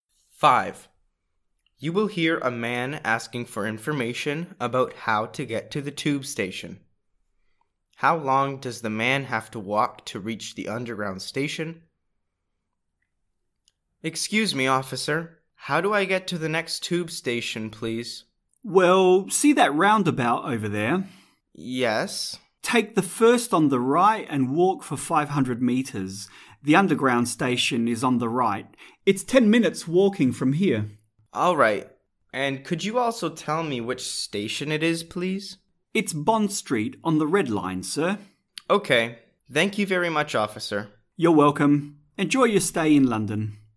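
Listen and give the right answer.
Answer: 10 minutes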